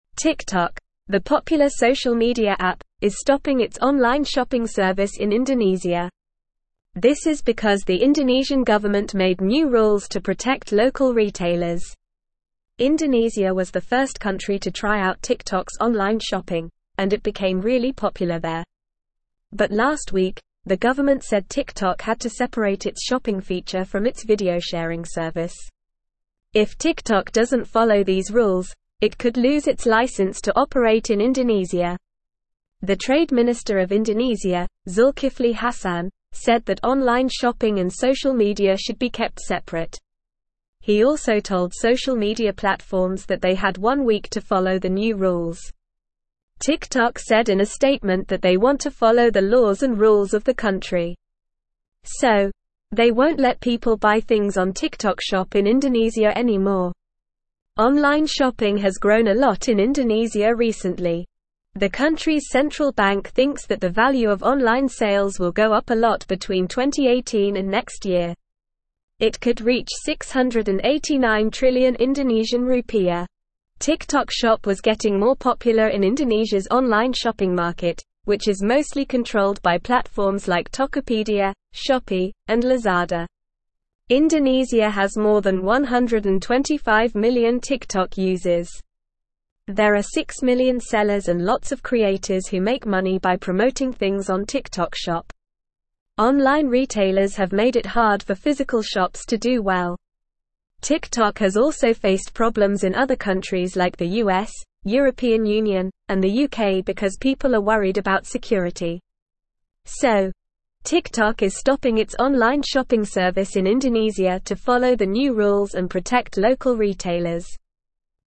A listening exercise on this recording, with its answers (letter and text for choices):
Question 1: Why is TikTok stopping its online shopping service in Indonesia?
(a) TikTok is facing security concerns in Indonesia.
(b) TikTok wants to focus on its video sharing service instead.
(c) Online shopping is not popular in Indonesia.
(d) The Indonesian government made new rules to protect local retailers.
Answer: (d) The Indonesian government made new rules to protect local retailers.

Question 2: What did the Indonesian government say TikTok had to do?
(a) Separate its shopping feature from its video sharing service.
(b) Shut down its operations in Indonesia.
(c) Increase its online sales in Indonesia.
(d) Merge with other online shopping platforms.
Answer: (a) Separate its shopping feature from its video sharing service.

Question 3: Who is Zulkifli Hasan?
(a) The CEO of TikTok.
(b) The founder of TikTok Shop.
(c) The trade minister of Indonesia.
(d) The spokesperson for local retailers in Indonesia.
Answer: (c) The trade minister of Indonesia.

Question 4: Why did the Indonesian government want online shopping and social media to be kept separate?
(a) To protect local retailers.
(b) To increase online sales in Indonesia.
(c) To promote physical shops.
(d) To make TikTok Shop more popular.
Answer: (a) To protect local retailers.

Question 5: Which platforms control Indonesia's online shopping market?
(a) TikTok, Instagram, and Facebook.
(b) Amazon, eBay, and Alibaba.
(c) Walmart, Target, and Best Buy.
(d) Tokopedia, Shopee, and Lazada.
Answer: (d) Tokopedia, Shopee, and Lazada.

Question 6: How many TikTok users are there in Indonesia?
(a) Less than 1 million.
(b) More than 125 million.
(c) Exactly 6 million.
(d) Around 100 million.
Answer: (b) More than 125 million.

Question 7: Who makes money by promoting things on TikTok Shop?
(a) Sellers.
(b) Physical shops.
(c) Creators.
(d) Online retailers.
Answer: (c) Creators.

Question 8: Where else has TikTok faced problems?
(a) China, Japan, and South Korea.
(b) The US, European Union, and the UK.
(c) Australia, New Zealand, and Canada.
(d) Brazil, Mexico, and Argentina.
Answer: (b) The US, European Union, and the UK.

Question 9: Indonesia was the first country to try out TikTok's online shopping feature, and it became very popular there.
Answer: True

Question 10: TikTok has decided to follow the new rules and will no longer allow people to buy things on TikTok Shop in Indonesia.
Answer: True

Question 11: The government demanded that TikTok integrate its shopping feature with its video sharing service.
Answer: False

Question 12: The Indonesian government implemented new rules to protect local retailers, which led to TikTok's decision.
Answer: True

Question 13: TikTok, a popular social media app, is expanding its online shopping service in Indonesia.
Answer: False

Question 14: Online shopping has declined significantly in Indonesia, and the country's central bank predicts a substantial decrease in online sales in the coming years.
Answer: False

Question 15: The trade minister of Indonesia believes that online shopping and social media should be kept separate.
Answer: True

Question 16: Compliance with the new rules could result in TikTok losing its license to operate in Indonesia.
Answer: False

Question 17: (1)______, the (2)______ (3)______ media app, is stopping its online shopping service in Indonesia.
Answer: TikTok

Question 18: (1)______, the (2)______ (3)______ media app, is stopping its online shopping service in Indonesia.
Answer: popular

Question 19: (1)______, the (2)______ (3)______ media app, is stopping its online shopping service in Indonesia.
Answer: social

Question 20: But last week, the government said TikTok had to separate its shopping (4)______ from its video sharing service.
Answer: feature

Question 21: The trade (5)______ of Indonesia, Zulkifli Hasan, said that online shopping and social media should be kept separate.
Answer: minister

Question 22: He also told social media (6)______ that they had one week to follow the new rules.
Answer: platforms

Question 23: TikTok said in a (7)______ that they want to follow the laws and rules of the (8)______.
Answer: statement

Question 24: TikTok said in a (7)______ that they want to follow the laws and rules of the (8)______.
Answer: country

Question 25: Online (9)______ has grown a lot in Indonesia recently.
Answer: shopping

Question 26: The country's central bank (10)______ that the value of online sales will go up a lot between 2018 and next year.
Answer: thinks

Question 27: It could (11)______ 689 trillion Indonesian rupiah.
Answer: reach

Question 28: TikTok Shop was getting more popular in Indonesia's online shopping market, which is mostly controlled by platforms like (12)______, Shopee, and Lazada.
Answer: Tokopedia

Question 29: There are 6 million sellers and lots of (13)______ who make money by promoting things on TikTok Shop.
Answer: creators

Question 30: Online (14)______ have made it hard for (15)______ shops to do well.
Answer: retailers

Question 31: Online (14)______ have made it hard for (15)______ shops to do well.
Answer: physical

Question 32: TikTok has also faced (16)______ in other countries like the US, European Union, and the UK because people are worried about security.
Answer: problems

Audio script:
TikTok, the popular social media app, is stopping its online shopping service in Indonesia. This is because the Indonesian government made new rules to protect local retailers. Indonesia was the first country to try out TikTok's online shopping, and it became really popular there. But last week, the government said TikTok had to separate its shopping feature from its video sharing service. If TikTok doesn't follow these rules, it could lose its license to operate in Indonesia.
The trade minister of Indonesia, Zulkifli Hasan, said that online shopping and social media should be kept separate. He also told social media platforms that they had one week to follow the new rules. TikTok said in a statement that they want to follow the laws and rules of the country. So, they won't let people buy things on TikTok Shop in Indonesia anymore.
Online shopping has grown a lot in Indonesia recently. The country's central bank thinks that the value of online sales will go up a lot between 2018 and next year. It could reach 689 trillion Indonesian rupiah. TikTok Shop was getting more popular in Indonesia's online shopping market, which is mostly controlled by platforms like Tokopedia, Shopee, and Lazada.
Indonesia has more than 125 million TikTok users. There are 6 million sellers and lots of creators who make money by promoting things on TikTok Shop. Online retailers have made it hard for physical shops to do well. TikTok has also faced problems in other countries like the US, European Union, and the UK because people are worried about security.

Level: Level 3